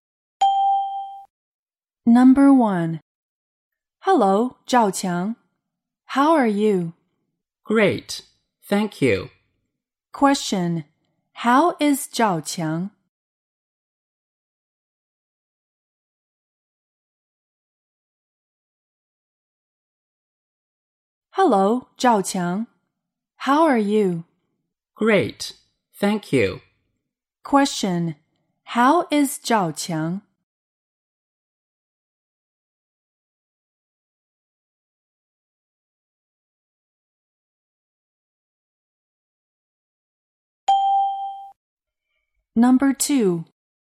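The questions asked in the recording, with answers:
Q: How is 赵强?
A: Great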